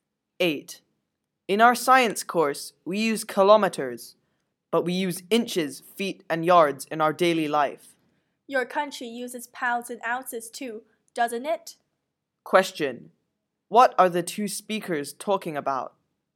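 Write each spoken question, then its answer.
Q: What are the two speakers talking about?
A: Systems of measurement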